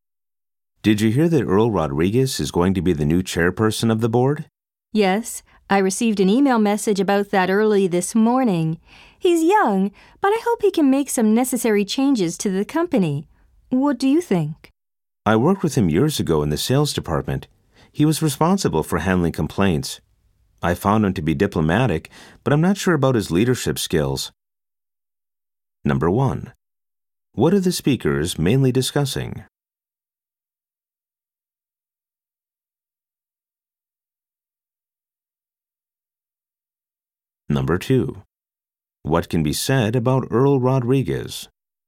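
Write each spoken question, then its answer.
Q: What are the speakers mainly discussing?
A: Earl Rodriguez becoming the new chairperson of the board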